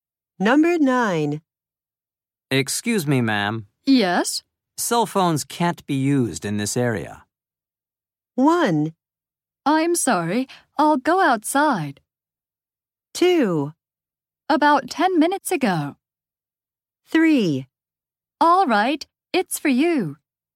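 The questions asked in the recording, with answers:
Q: Cell phones can't be used in this area.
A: 1: I'm sorry. I'll go outside.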